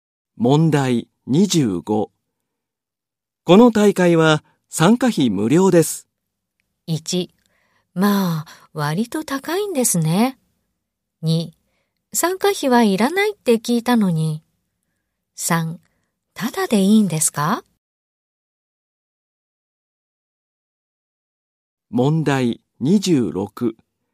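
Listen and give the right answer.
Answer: 3: ただでいいんですか?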